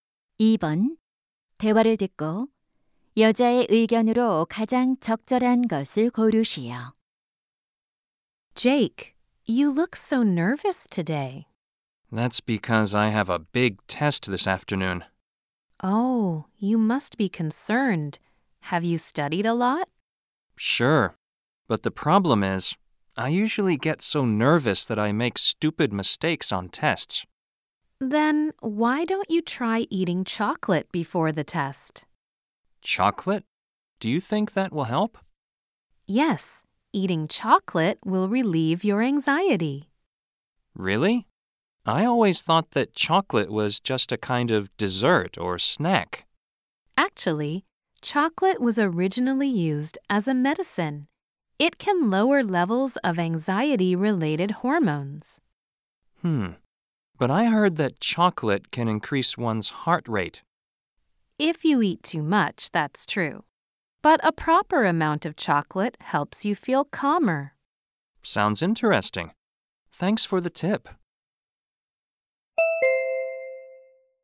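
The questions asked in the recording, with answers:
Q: 대화를 듣고 여자의 의견으로 가장 적절한 것을 고르시오.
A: 적당량의 초콜릿을 먹으면 불안 완화에 도움이 된다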